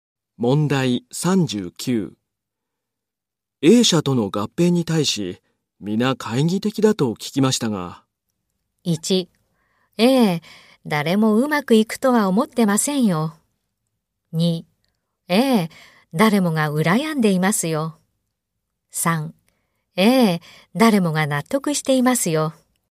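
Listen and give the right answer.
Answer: 1: ええ、誰もうまくいくとは思ってませんよ。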